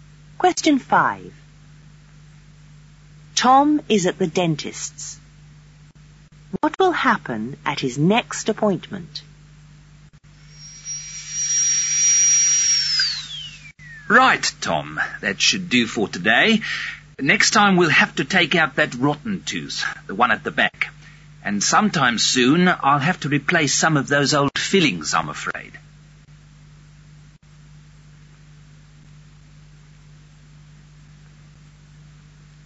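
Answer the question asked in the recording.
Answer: His rotten back tooth will be taken out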